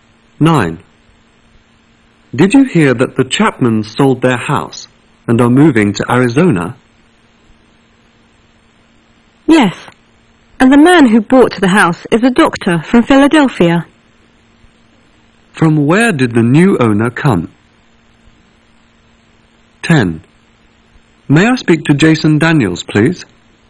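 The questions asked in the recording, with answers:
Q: From where did the new owner come?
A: Philadelphia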